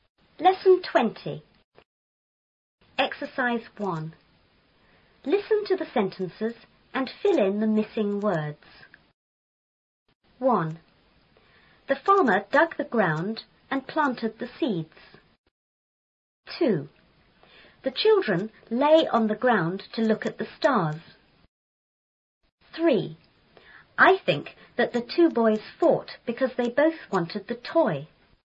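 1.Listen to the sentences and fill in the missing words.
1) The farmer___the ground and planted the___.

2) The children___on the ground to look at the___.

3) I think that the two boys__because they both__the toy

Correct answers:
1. dug; seeds
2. lay; stars
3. fought; wanted

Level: 初中英语广州版4B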